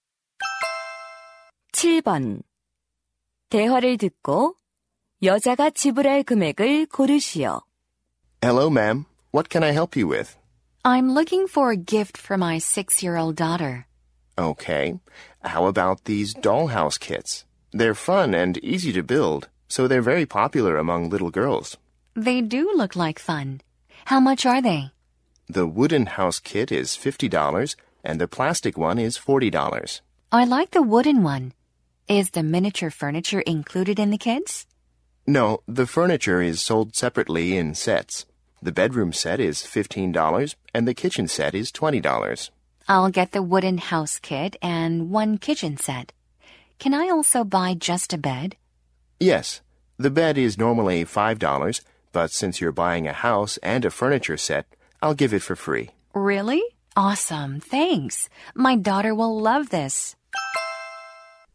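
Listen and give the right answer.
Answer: $70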